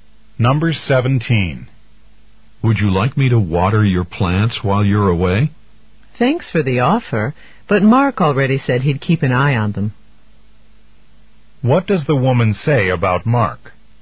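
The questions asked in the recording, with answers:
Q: What does the woman say about Mark?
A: He already offered to take care of the plants.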